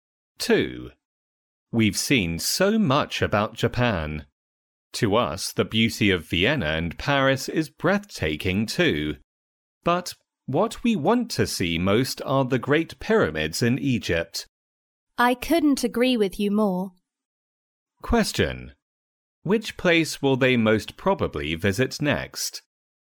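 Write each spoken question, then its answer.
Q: Which place will they most probably visit next?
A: The Great Pyramids in Egypt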